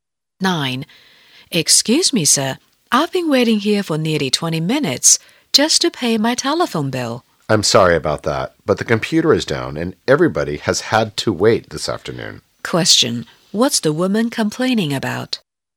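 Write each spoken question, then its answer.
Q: What's the woman complaining about?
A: She has waited nearly 20 minutes to pay her telephone bill.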